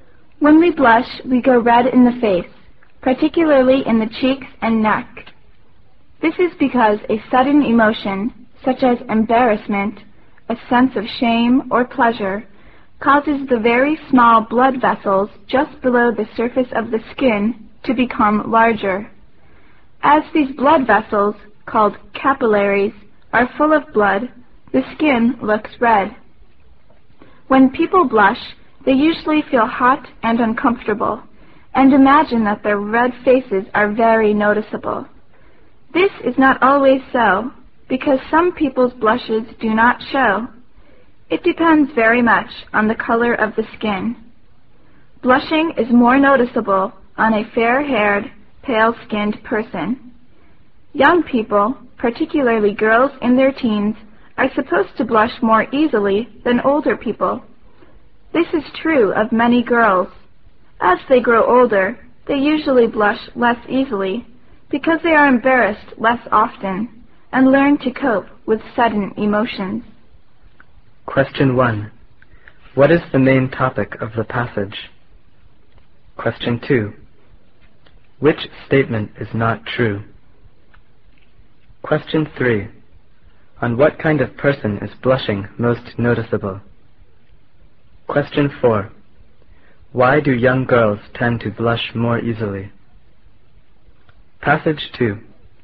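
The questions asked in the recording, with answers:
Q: What is the main topic of the passage?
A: Blushing

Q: On what kind of person is blushing most noticeable?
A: A fair-haired, pale-skinned person

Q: Why do young girls tend to blush more easily?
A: They are embarrassed more often and have not learned to cope with sudden emotions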